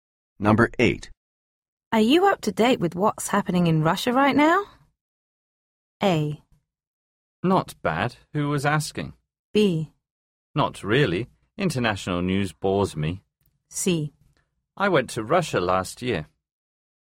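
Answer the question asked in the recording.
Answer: B: Not really. International news bores me.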